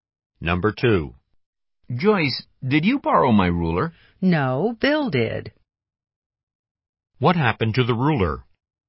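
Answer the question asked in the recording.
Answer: Bill borrowed it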